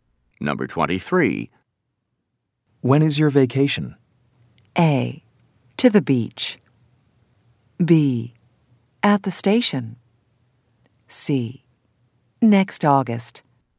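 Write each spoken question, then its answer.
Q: When is your vacation?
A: C: Next August.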